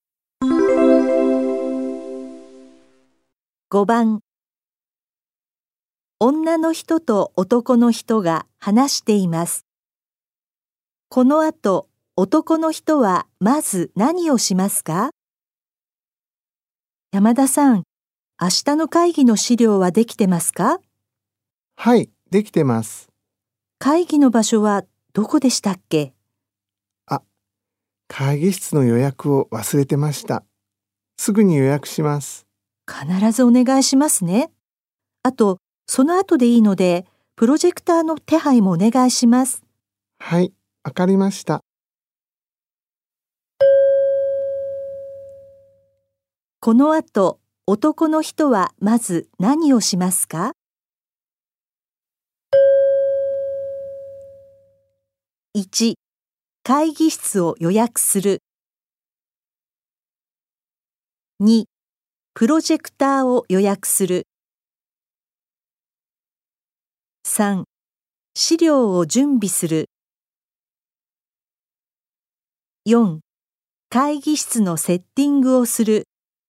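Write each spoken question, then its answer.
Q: この後、男の人はまず何をしますか?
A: 1: 会議室を予約する。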